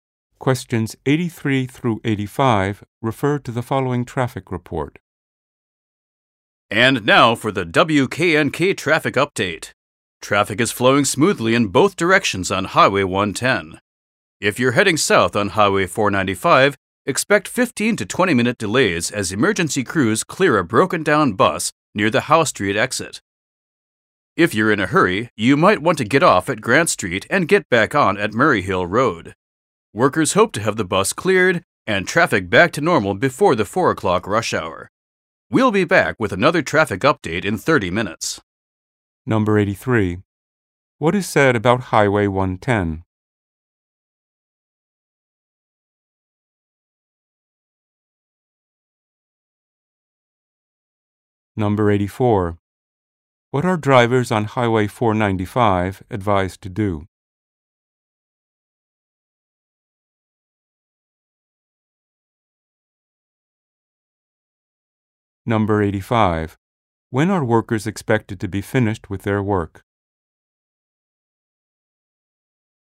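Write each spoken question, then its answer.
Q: What is said about Highway 110?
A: Traffic is flowing smoothly

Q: What are drivers on Highway 495 advised to do?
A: Take a detour via Grant Street and Murray Hill Road

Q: When are workers expected to be finished with their work?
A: Before the 4 o'clock rush hour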